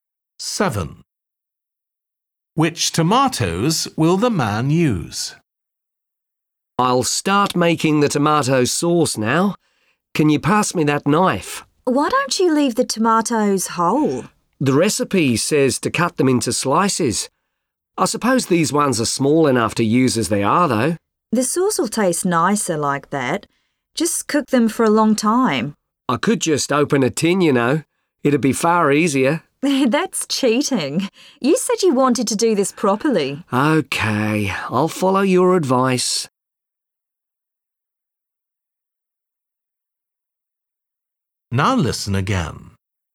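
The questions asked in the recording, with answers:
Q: Which tomatoes will the man use?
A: Small, whole fresh tomatoes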